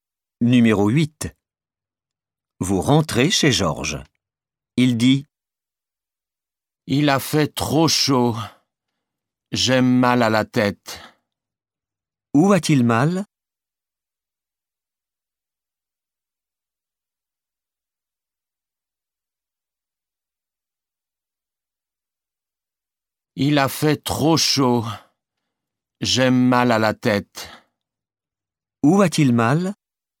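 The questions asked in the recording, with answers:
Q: Où a-t-il mal?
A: à la tête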